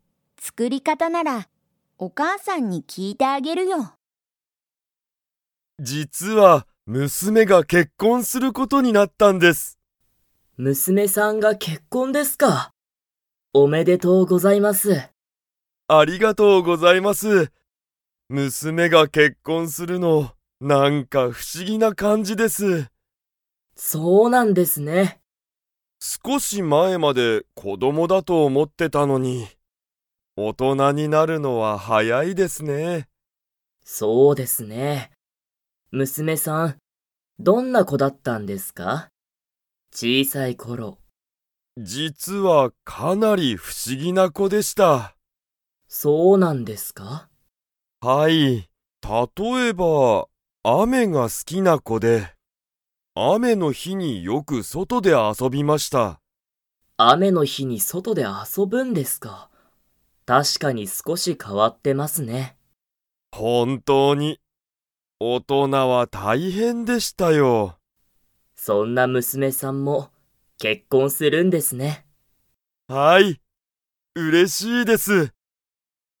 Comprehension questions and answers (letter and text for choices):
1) 石田いしださんの娘むすめが することになった。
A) 料理りょうり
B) 勉強べんきょう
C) 仕事しごと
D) 結婚けっこん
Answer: D) 結婚けっこん

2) 石田いしださんの娘むすめは、雨あめが好すきでしたか?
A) はい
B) いいえ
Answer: A) はい

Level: Level 3